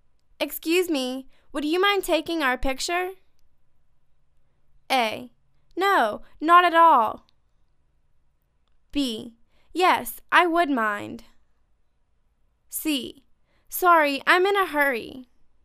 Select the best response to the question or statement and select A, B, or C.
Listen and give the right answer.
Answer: No, not at all.